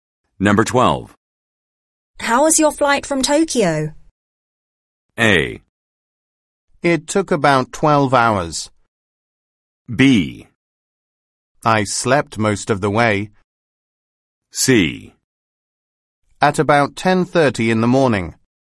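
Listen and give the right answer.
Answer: B: I slept most of the way.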